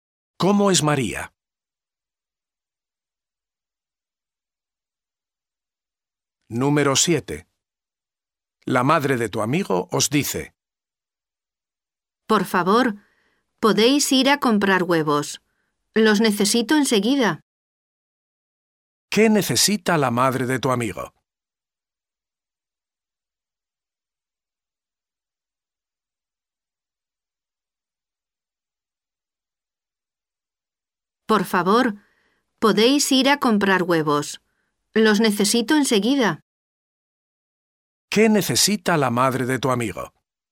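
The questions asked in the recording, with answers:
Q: ¿Qué necesita la madre de tu amigo?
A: Huevos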